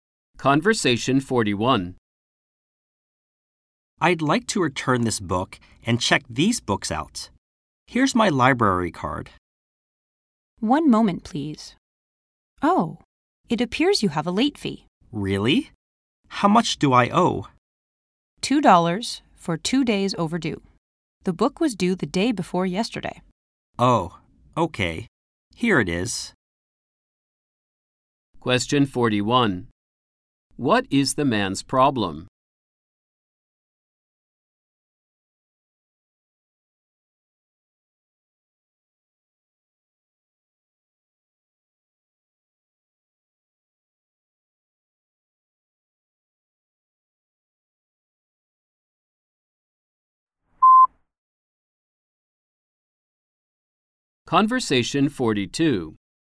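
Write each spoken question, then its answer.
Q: What is the man's problem?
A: He has a late fee ($2) because the book was 2 days overdue.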